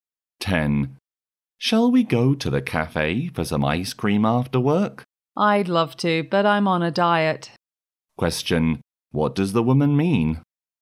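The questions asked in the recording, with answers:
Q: What does the woman mean?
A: She won't go because she is on a diet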